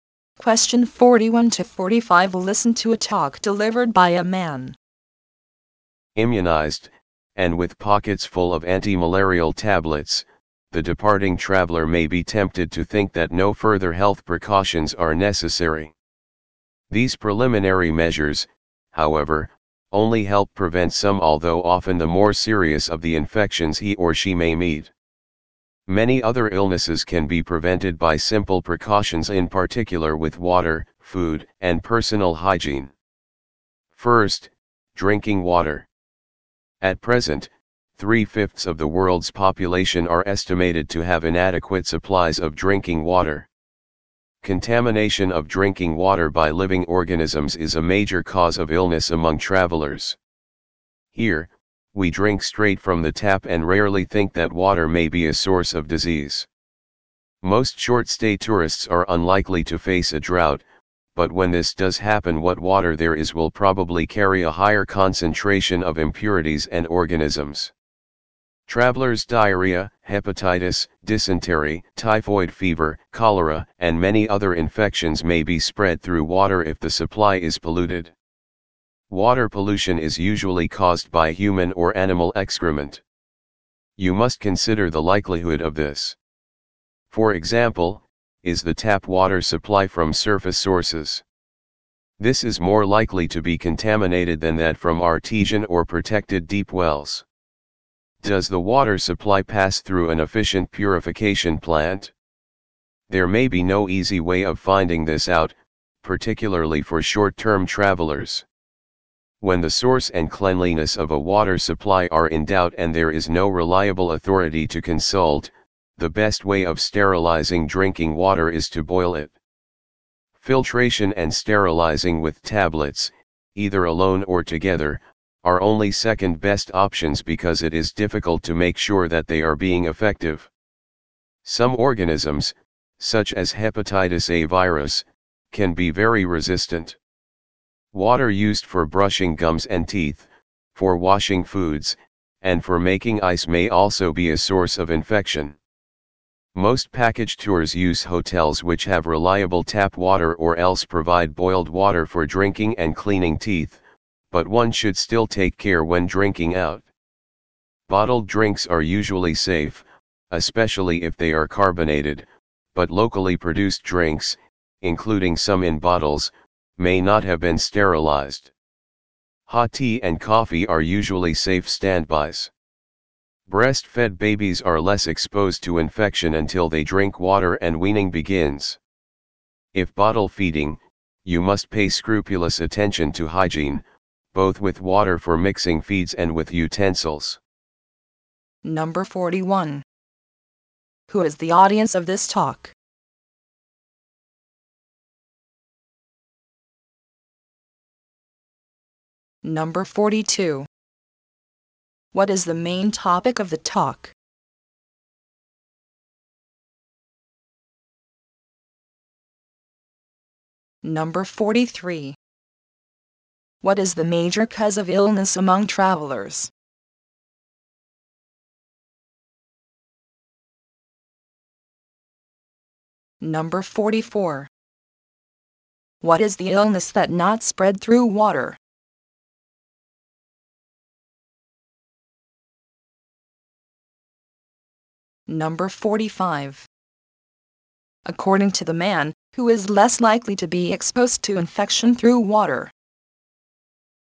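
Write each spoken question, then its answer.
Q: What is the main topic of the talk?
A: Health precautions for travelers, especially drinking water

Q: What is the major cause of illness among travelers?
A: Drinking water contaminated by living organisms

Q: According to the man, who is less likely to be exposed to infection through water?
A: Breastfed babies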